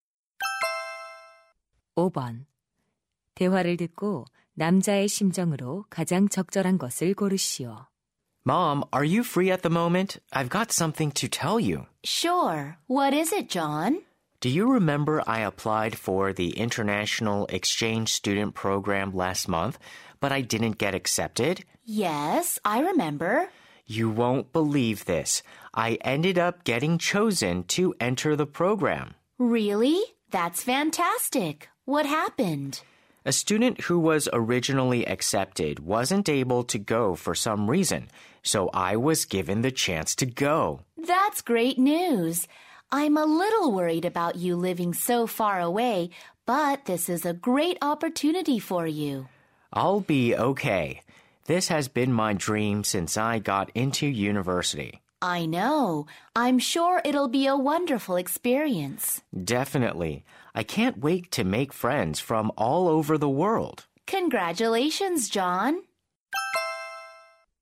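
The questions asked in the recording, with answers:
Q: 대화를 듣고 남자의 심정으로 가장 적절한 것을 고르시오.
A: 기쁘고 설렘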